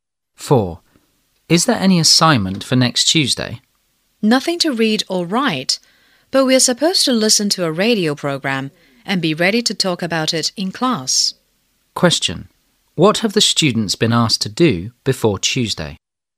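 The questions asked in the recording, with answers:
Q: What have the students been asked to do before Tuesday?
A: Listen to a radio program and be ready to talk about it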